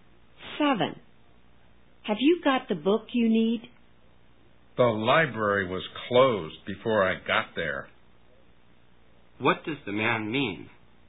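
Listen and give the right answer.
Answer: He didn't get the book because the library was closed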